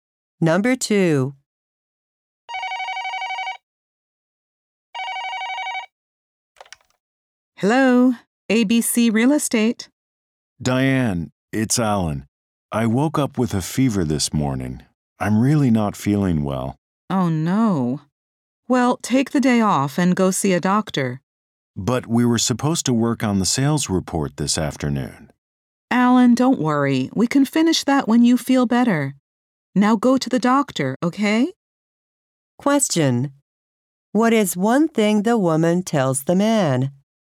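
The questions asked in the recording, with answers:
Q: What is one thing the woman tells the man?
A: To take the day off and see a doctor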